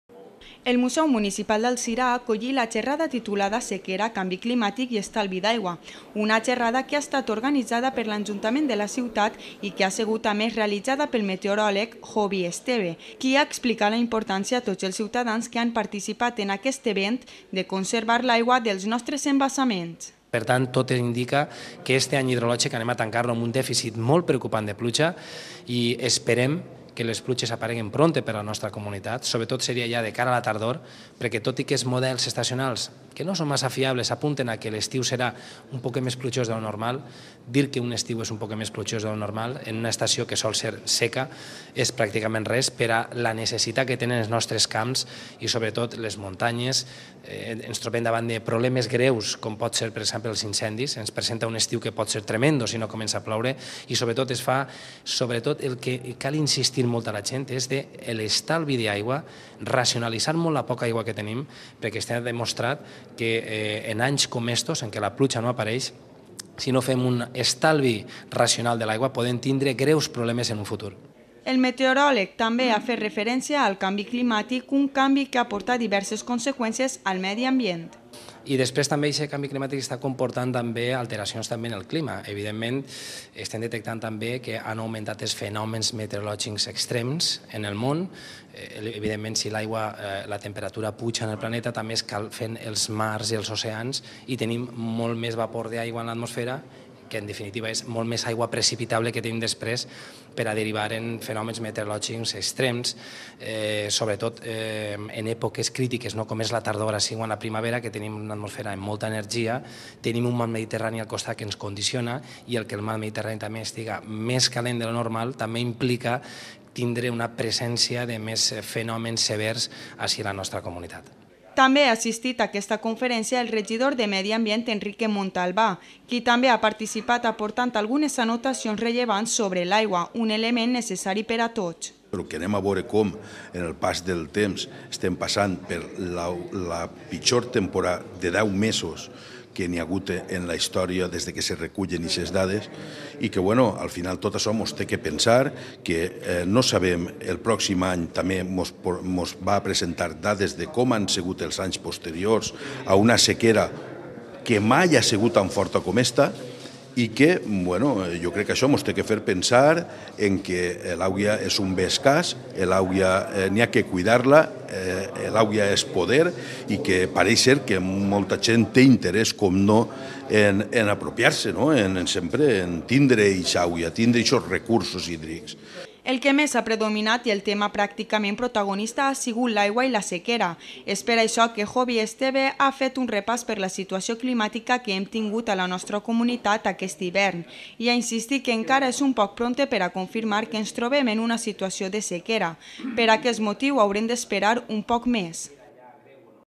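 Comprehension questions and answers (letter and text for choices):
Escolta la notícia televisiva, llig els enunciats i completa'ls amb una de les opcions indicades.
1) La xarrada «Sequera, canvi climàtic i estalvi d'aigua».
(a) l'ha organizada 'Ajuntament d'Alzira i l'ha feta el regidor local per a informar sobre la importància de conservar l'aigua.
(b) l'ha organitzada l'Ajuntament d'Alzira il'ha feta el meteoròleg Jovi Esteve.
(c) l'ha feta el meteoròleg Jovi Esteve per a informar únicament sobre els efectes del canvi climàtic.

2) Segons es declara en aquest moment...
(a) l'any hidrologic resulta positiu perquè es preveuen pluges a l'estiu.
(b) l'any hidrològic es tanca de manera negativa perqué no plou la quantitat suficient, però hi ha posibilitats d'afrontar incendis o sequeres.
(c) l'any hidrològic resulta negatiu perquè, encara que plourà a l'estiu, és insuficient per a afrontar les necesitats dels camps, de les muntanyes, dels incendis possibles.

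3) Jovi Esteve insisteix...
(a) en la gestió de l'aigua per als embassaments.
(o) en l'estalvi de l'aigua per part de la gent.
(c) en la racionalització dels recursos destinats a l'aigua.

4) El canvi climàtic...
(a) ha fet augmentar els fenòmens meteorològics extrems en el món.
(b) ha fet que les èpoques estacionals crítiques ara siguen la tardor i l'hivern.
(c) ha fet augmentar els fenòmens meteorològics extrems al pol Nord.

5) Al territori valencià...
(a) la mar Mediterrània pateix canvis que fan que la primavera siga una època crítica.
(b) la mar Mediterrània condiciona que hi haja diferents fenòmens meteorològics severs.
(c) l'escalfament de l'aigua de al Mediterrània afecta sobretot al zona del litoral.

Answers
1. (b) l'ha organitzada l'Ajuntament d'Alzira il'ha feta el meteoròleg Jovi Esteve.
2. (c) l'any hidrològic resulta negatiu perquè, encara que plourà a l'estiu, és insuficient per a afrontar les necesitats dels camps, de les muntanyes, dels incendis possibles.
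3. (o) en l'estalvi de l'aigua per part de la gent.
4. (a) ha fet augmentar els fenòmens meteorològics extrems en el món.
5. (b) la mar Mediterrània condiciona que hi haja diferents fenòmens meteorològics severs.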